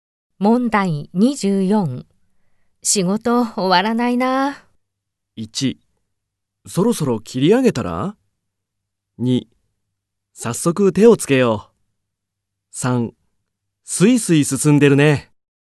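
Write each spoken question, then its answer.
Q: 仕事終わらないな。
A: 1: そろそろ切り上げたら?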